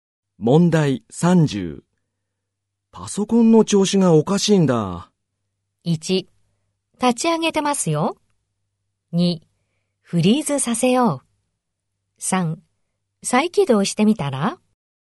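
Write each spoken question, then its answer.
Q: パソコンの調子がおかしいんだ。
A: 3: 再起動してみたら?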